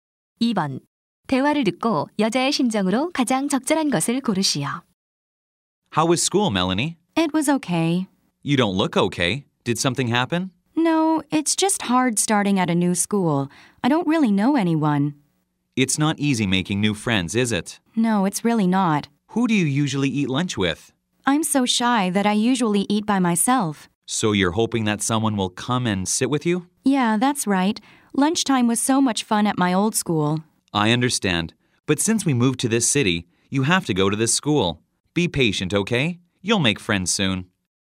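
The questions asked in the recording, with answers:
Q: 대화를 듣고 여자의 심정으로 가장 적절한 것을 고르시오.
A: 외로움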